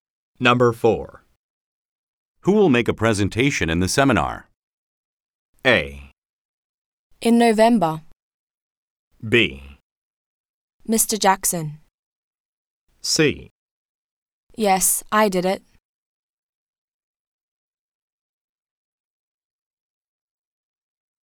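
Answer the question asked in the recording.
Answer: B: Mr. Jackson.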